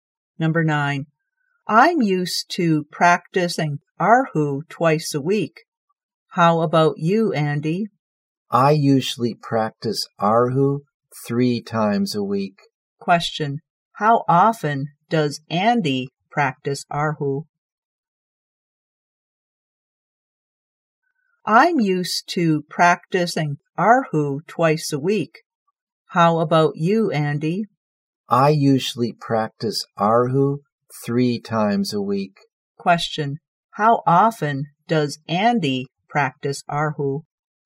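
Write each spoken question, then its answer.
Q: Question. How often does Andy practice Arhu?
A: Three times a week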